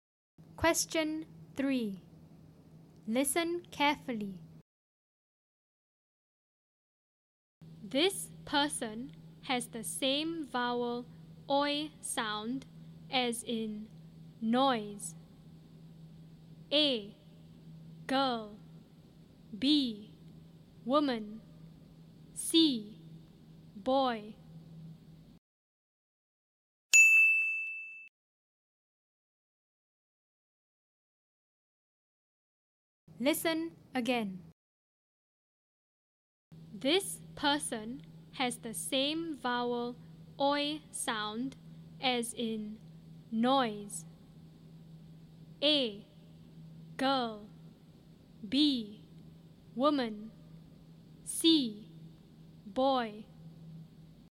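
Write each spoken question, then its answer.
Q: This person has the same vowel oi sound as in noise.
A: C: Boy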